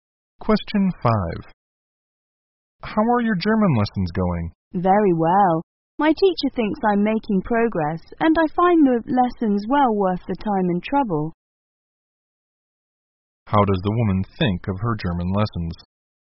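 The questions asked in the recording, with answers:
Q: How does the woman think of her German lessons?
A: They are worth the time and trouble.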